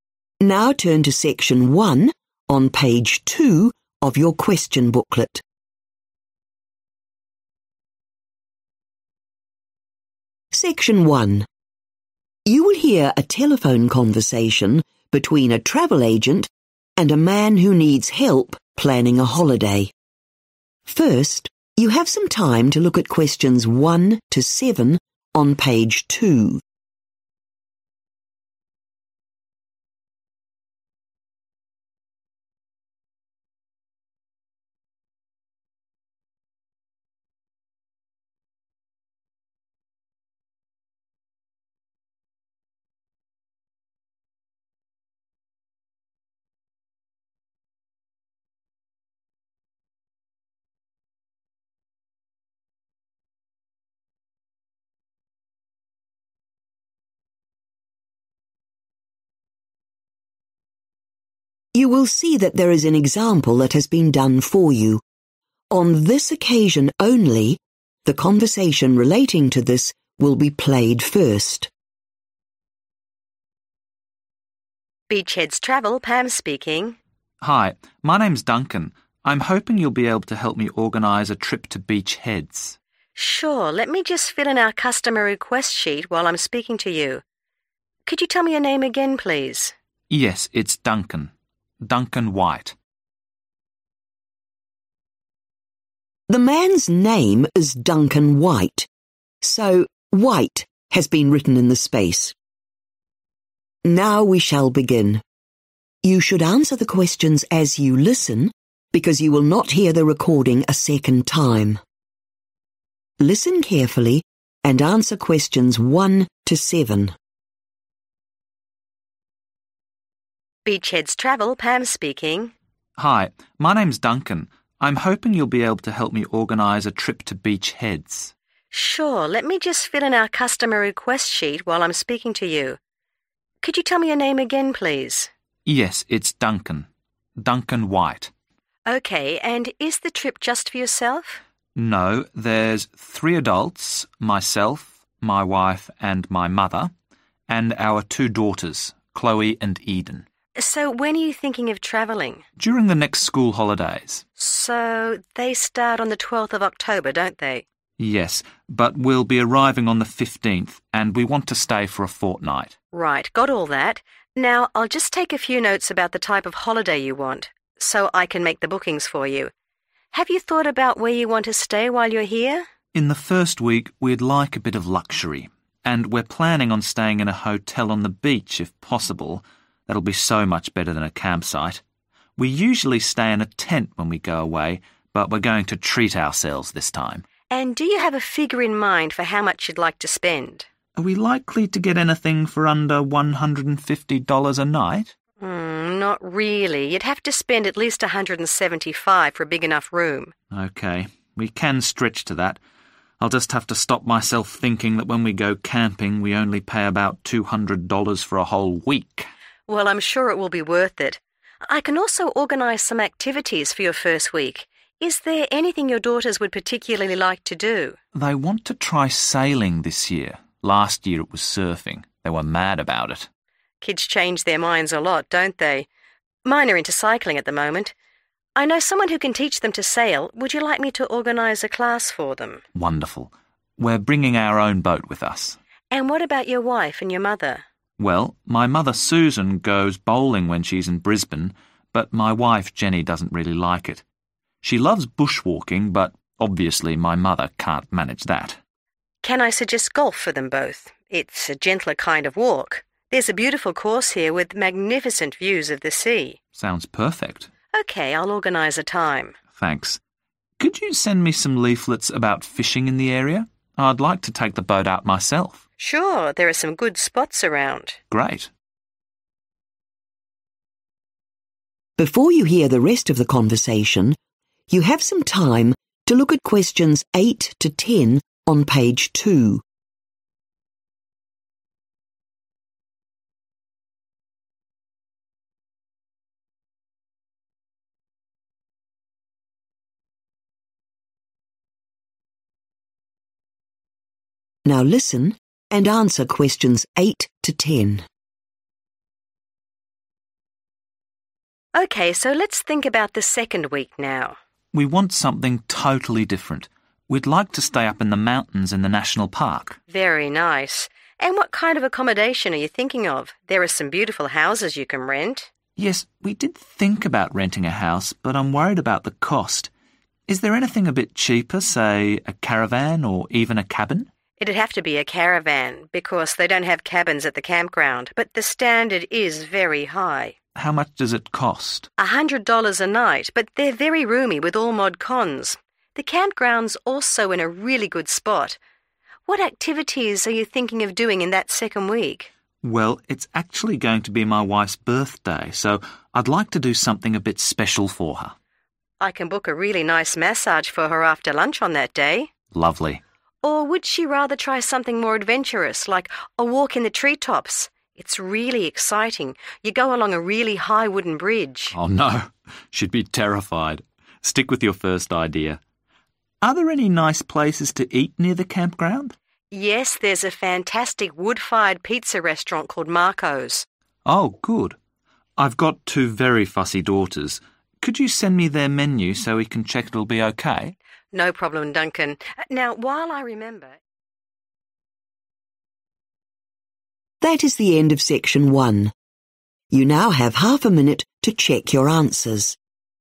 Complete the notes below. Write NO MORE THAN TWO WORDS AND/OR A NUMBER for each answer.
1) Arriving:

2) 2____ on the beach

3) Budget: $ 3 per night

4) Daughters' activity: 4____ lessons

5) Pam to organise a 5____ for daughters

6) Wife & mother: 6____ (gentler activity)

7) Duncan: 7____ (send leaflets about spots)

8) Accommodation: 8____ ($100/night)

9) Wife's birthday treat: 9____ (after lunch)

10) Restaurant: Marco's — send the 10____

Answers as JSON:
{"1": "15th October", "2": "hotel", "3": "175", "4": "sailing", "5": "class", "6": "golf", "7": "fishing", "8": "caravan", "9": "massage", "10": "menu"}